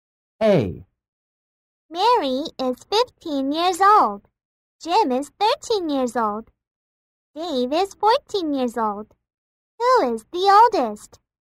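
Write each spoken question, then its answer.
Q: Who is the oldest?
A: Mary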